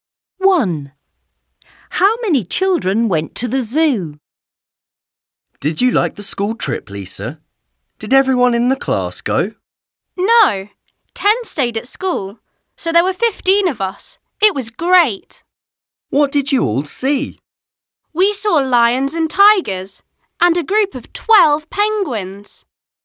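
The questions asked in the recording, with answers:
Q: How many children went to the zoo?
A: 15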